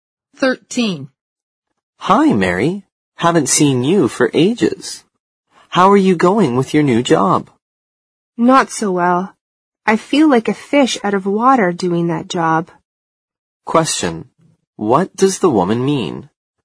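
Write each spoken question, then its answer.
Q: What does the woman mean?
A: She feels uncomfortable and out of place in her new job.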